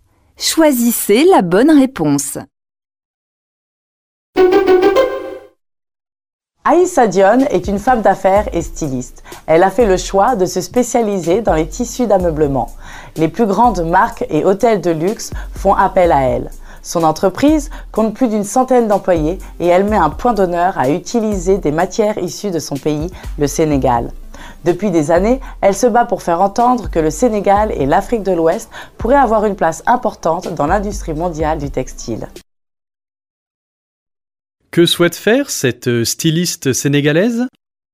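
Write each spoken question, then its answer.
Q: Que souhaite faire cette styliste sénégalaise ?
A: Donner au Sénégal et à l'Afrique de l'Ouest une place importante dans l'industrie mondiale du textile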